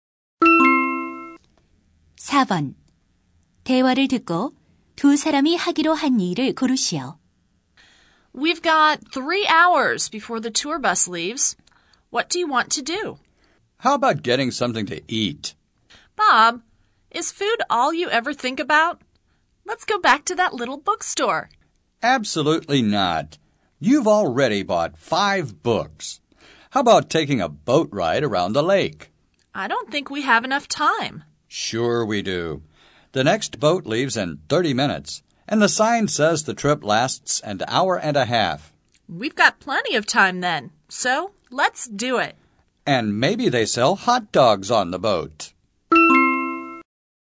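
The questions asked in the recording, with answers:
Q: 대화를 듣고 두 사람이 하기로 한 일을 고르시오.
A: 호수에서 보트 타기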